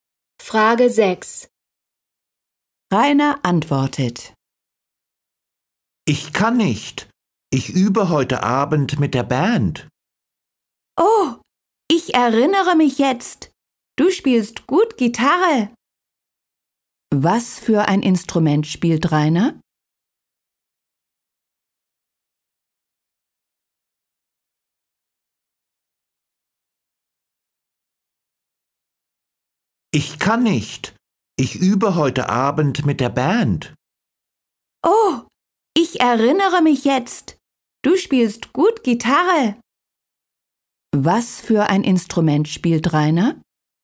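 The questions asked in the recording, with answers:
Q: Was für ein Instrument spielt Rainer?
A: Gitarre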